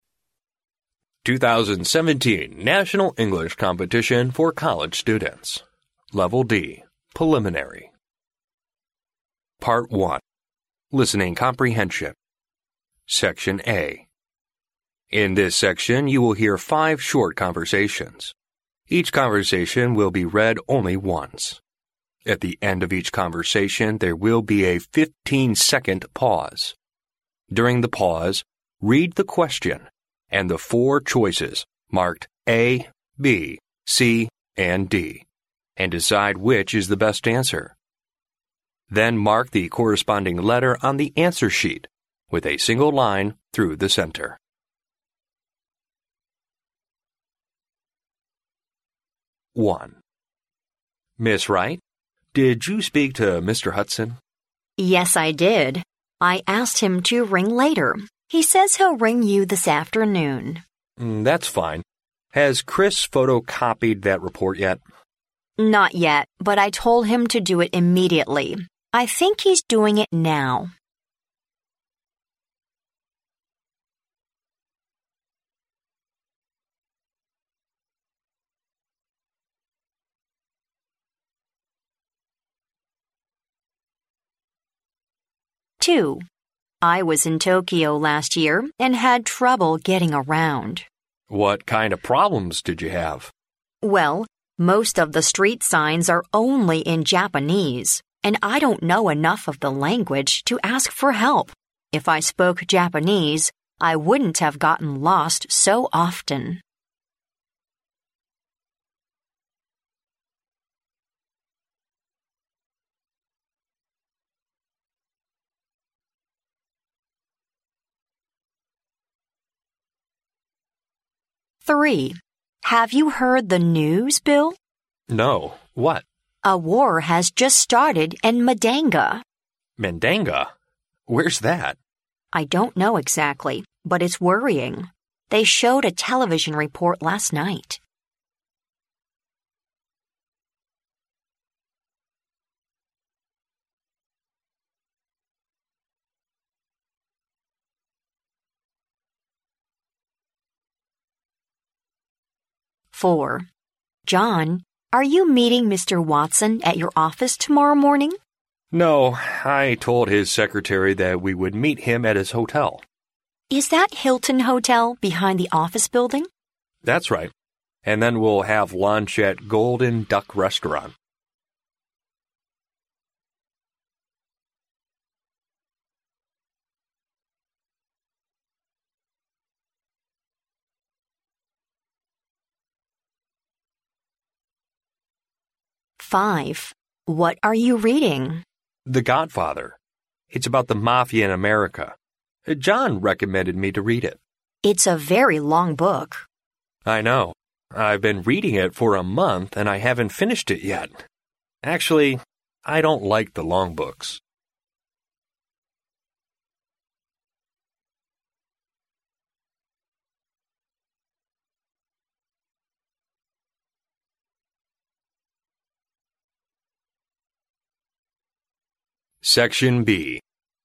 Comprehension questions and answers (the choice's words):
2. Why did the woman often get lost in Tokyo?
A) The street signs are not easily found.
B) She couldn't speak Japanese.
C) She was afraid of asking the way.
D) The Japanese are not friendly.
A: She couldn't speak Japanese.

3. How did the woman learn about the war in Mandanga?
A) From the Internet.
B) On television.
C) From the newspaper.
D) Bill told her.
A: On television.

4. Where will John meet Mr. Watson tomorrow morning?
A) In John's office.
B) In the office building.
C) At Golden Duck Restaurant.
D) At Hilton Hotel.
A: At Hilton Hotel.

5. Why did the man read The Godfather ?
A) Someone recommended him to do it.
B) He wanted to try a long book.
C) He read it for writing a term paper.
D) It was a best-seller of the time.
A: Someone recommended him to do it.

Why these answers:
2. 录音中男士问女士在东京遇到了什么麻烦时,女士回答说因自己不了解日语以至于看不懂路牌时无法求助,并使用虚拟语气"If I spoke Japanese..."。由此可知该女士不会讲日语。故选B项。
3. 录音中当男士问起Mandanga时,女士回答自己也了解得不够确切,但是"They showed a television report last night"。由此可知女士是从电视了解到该地发生了战争。故选B项。
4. 录音中男士John表示要在旅馆和Mr. Watson会面,当女士问起是否是Hilton Hotel时,John回答"That's right",可知会面地是Hilton Hotel。故选D项。
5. 录音中女士问起男士读的书时,男士回答是《教父》并提及"John recommended me to read it"。由此可推测男士是在得到推荐后才去阅读此书。故选A项。